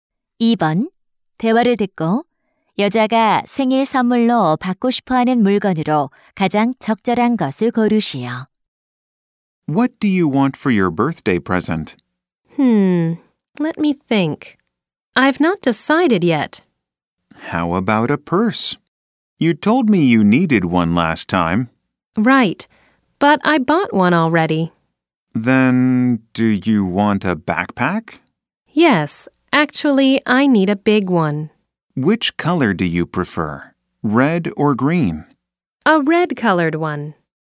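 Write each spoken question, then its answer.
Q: 대화를 듣고 여자가 생일 선물로 받고 싶어하는 물건으로 가장 적절한 것을 고르시오.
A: 빨간색 큰 배낭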